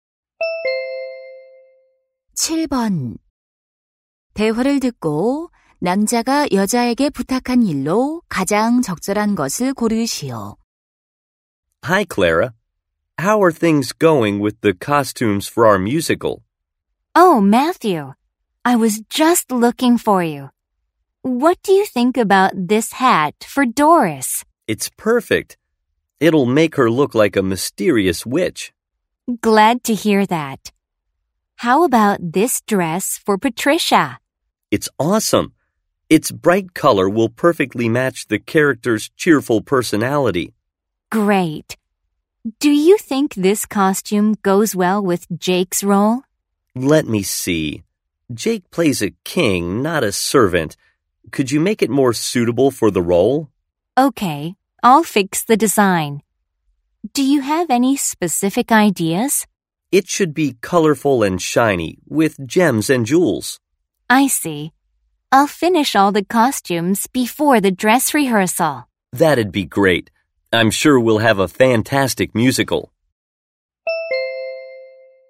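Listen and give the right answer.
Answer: 왕 역할에 맞게 의상 디자인 수정하기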